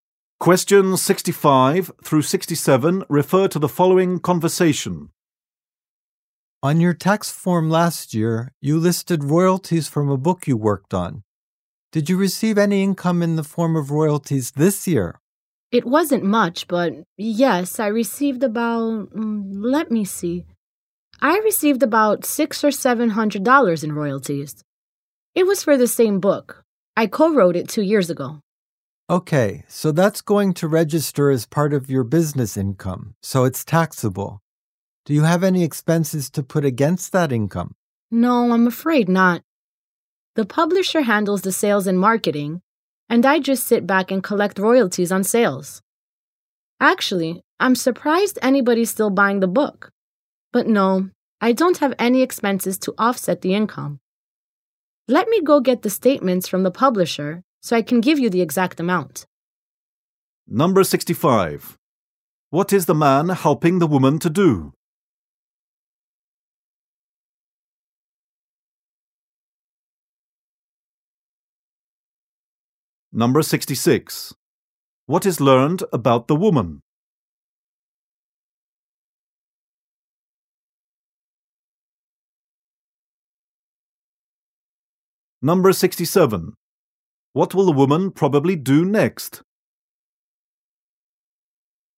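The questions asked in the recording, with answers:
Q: What is the man helping the woman to do?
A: Do her taxes

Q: What is learned about the woman?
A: She co-wrote a book and receives royalties

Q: What will the woman probably do next?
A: Get the statements from the publisher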